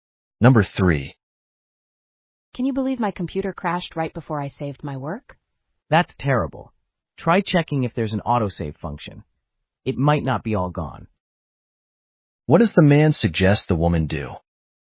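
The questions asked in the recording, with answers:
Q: What does the man suggest the woman do?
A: Check for an autosave function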